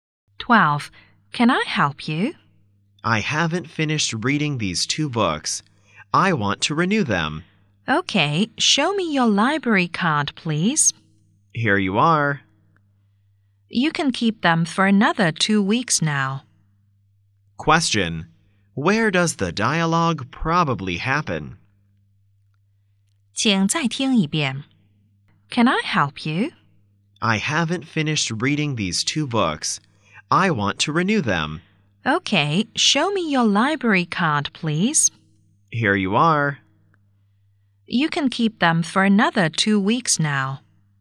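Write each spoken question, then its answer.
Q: where does the dialogue probably happen?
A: In a library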